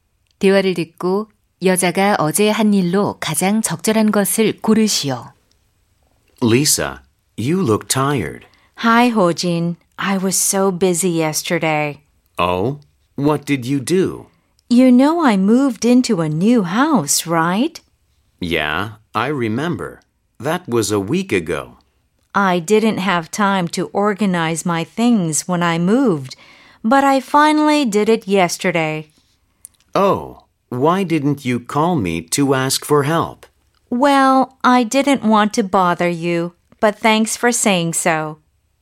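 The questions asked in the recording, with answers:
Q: 14번 대화를 듣고 여자가 어제 한 일로 가장 적절한 것을 고르시오.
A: 이사한 집의 짐 정리하기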